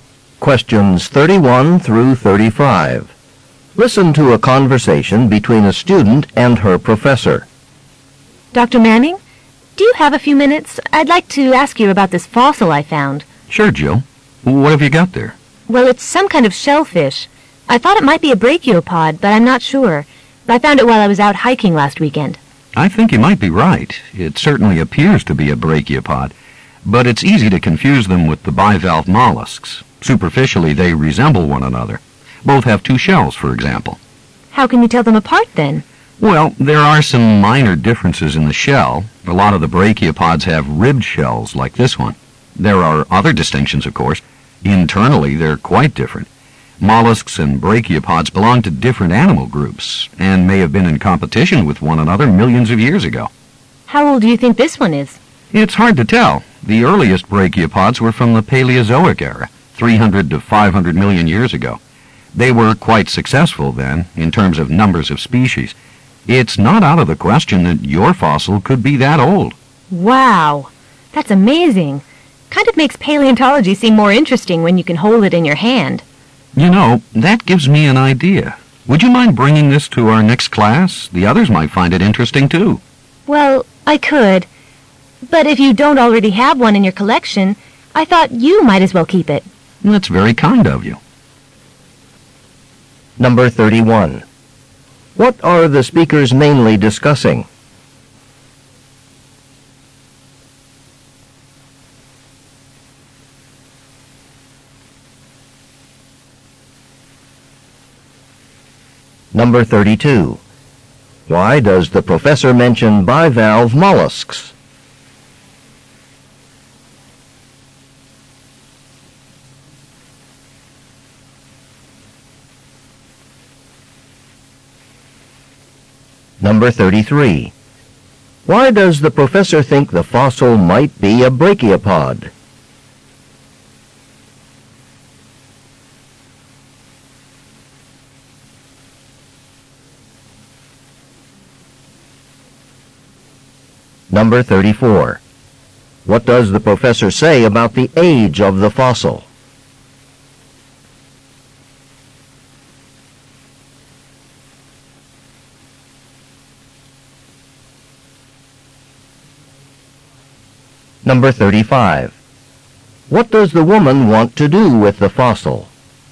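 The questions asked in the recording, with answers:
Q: What are the speakers mainly discussing?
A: A fossil the student found

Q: Why does the professor mention bivalve mollusks?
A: They are easy to confuse with brachiopods.

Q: Why does the professor think the fossil might be a brachiopod?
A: It has a ribbed shell.

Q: What does the professor say about the age of the fossil?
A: It could be 300 to 500 million years old.

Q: What does the woman want to do with the fossil?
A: Give it to the professor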